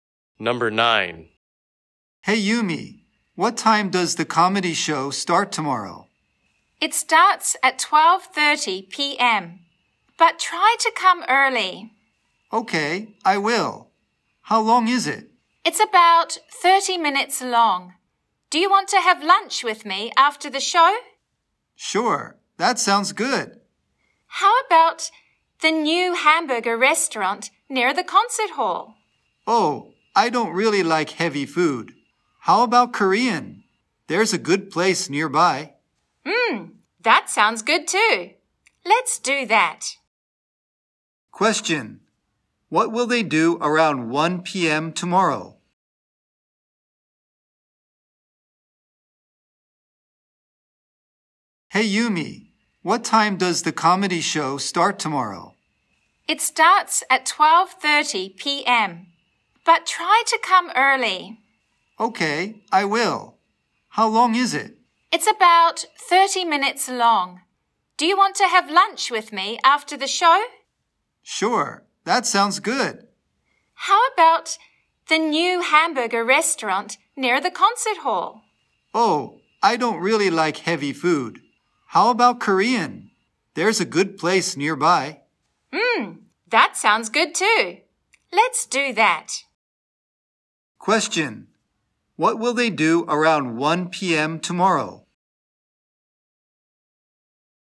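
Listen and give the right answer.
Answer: Have lunch at a Korean restaurant.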